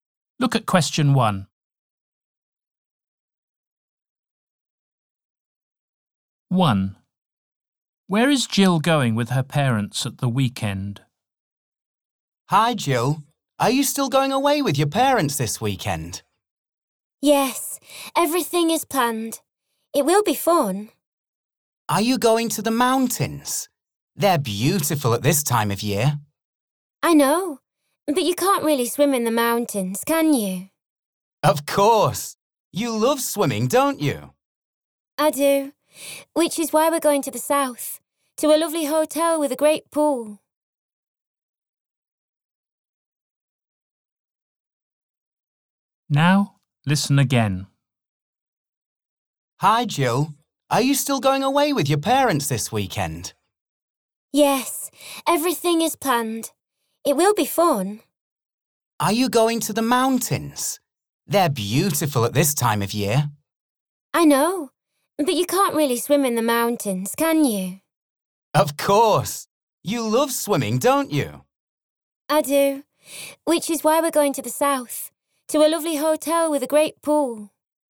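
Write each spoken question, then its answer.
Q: Where is Jill going with her parents at the weekend?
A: To a hotel with a pool in the south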